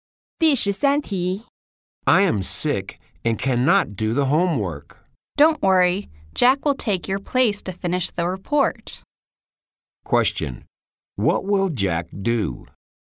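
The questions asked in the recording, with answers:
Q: what will Jack do?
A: Finish the report for the sick speaker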